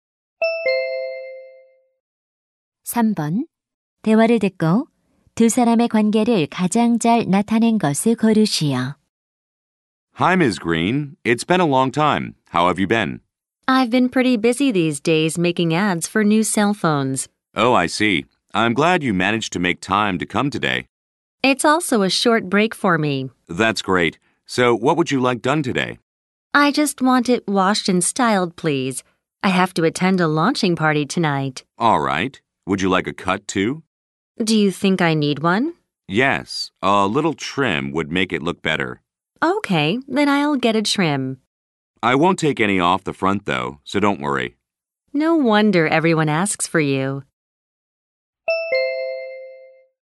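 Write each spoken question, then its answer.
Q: 대화를 듣고 두 사람의 관계를 가장 잘 나타낸 것을 고르시오.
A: 미용사 - 손님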